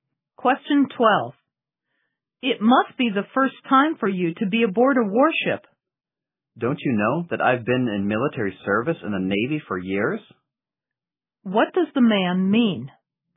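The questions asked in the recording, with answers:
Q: What does the man mean?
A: He has been aboard warships many times while serving in the Navy.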